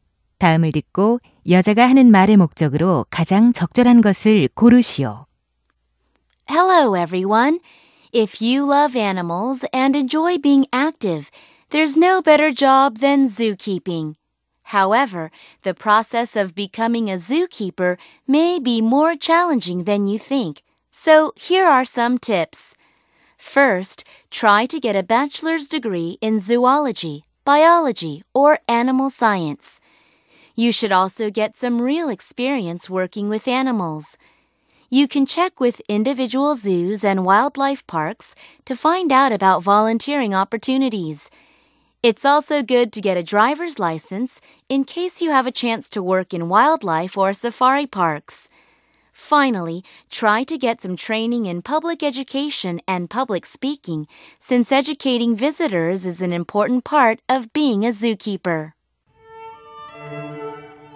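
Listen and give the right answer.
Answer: 사육사가 되기 위한 방법을 조언하려고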